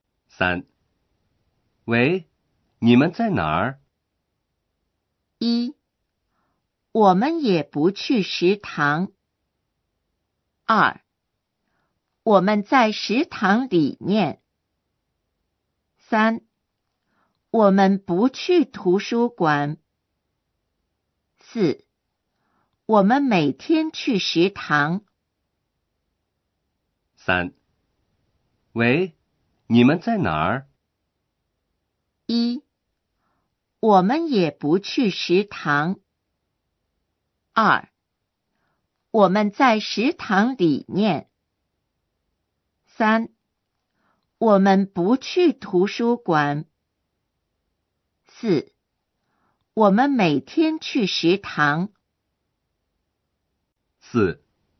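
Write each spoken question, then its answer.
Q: 喂,你们在哪儿?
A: 2: 我们在食堂里面。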